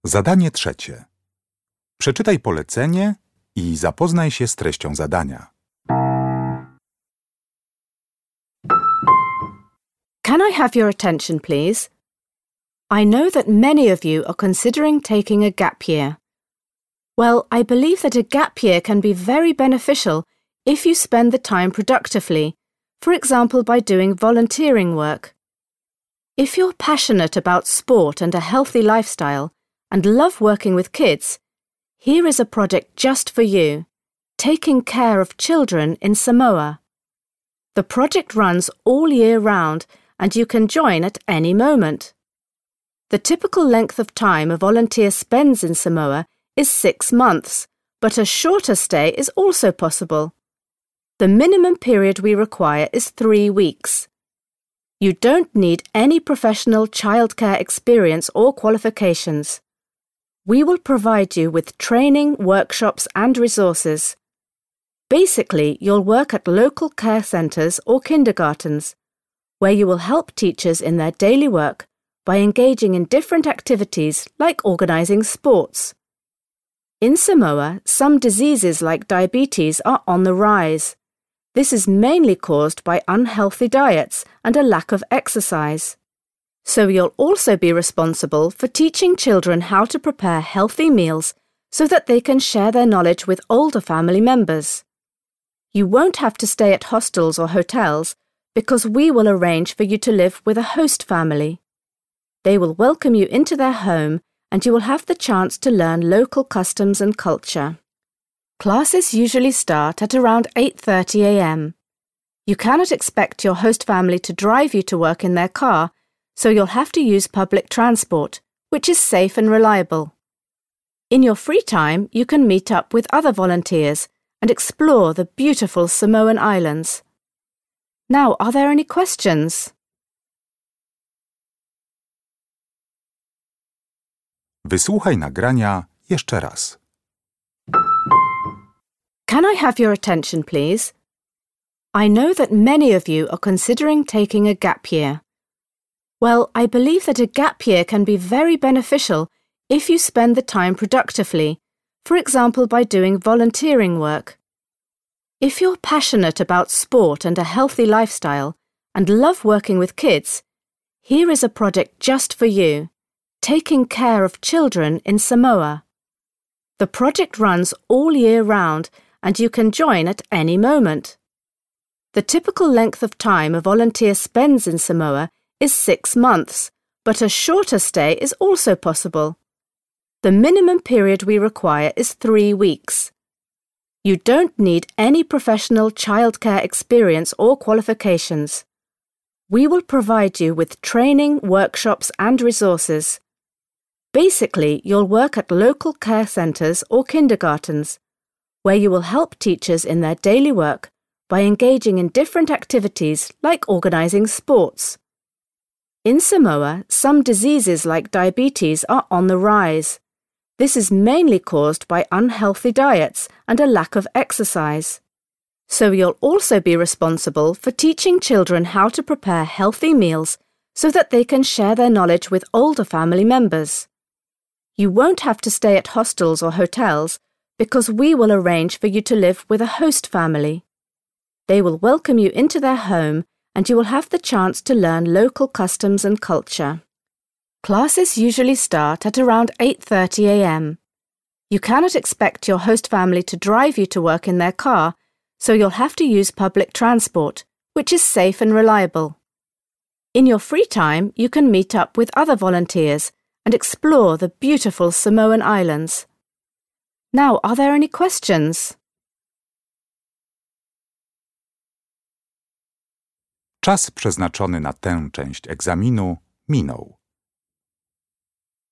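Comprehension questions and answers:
Uruchamiając odtwarzacz z oryginalnym nagraniem CKE usłyszysz dwukrotnie informację o możliwości pracy w ramach wolontariatu. Na podstawie informacji zawartych w nagraniu uzupełnij luki 3.1.–3.4. w notatce, tak aby jak najbardziej precyzyjnie oddać sens wysłuchanego tekstu. Luki należy uzupełnić w języku angielskim.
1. Length of stay: at least 3.1.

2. Duties: organizing sports activities and teaching children how to make 3.2.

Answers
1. 3 weeks
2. healthy meals

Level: poziom podstawowy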